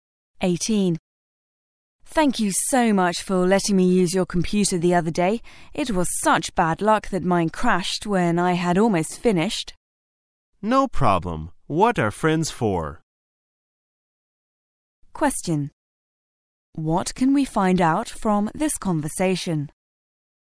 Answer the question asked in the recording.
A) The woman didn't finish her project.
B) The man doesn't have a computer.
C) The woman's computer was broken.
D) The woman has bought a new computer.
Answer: C) The woman's computer was broken.

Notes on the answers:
此题考查听细节的能力。解题的关键在于听到原mine crashed意指"电脑坏了"与答案中的the woman's computer was broken.同义。

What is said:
[解析] W: Thank you so much for letting me use your computer the other day. It was such bad luck that mine crashed when I had almost finished. M: No problem. What are friends for? Q: What can we find out from this conversation?